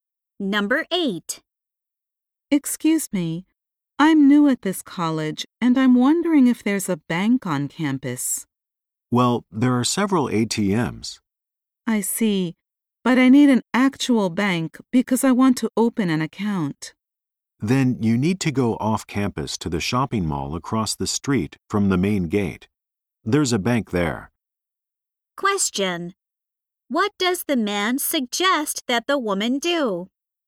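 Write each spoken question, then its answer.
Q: What does the man suggest that the woman do?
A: Go to the bank at the shopping mall across from the main gate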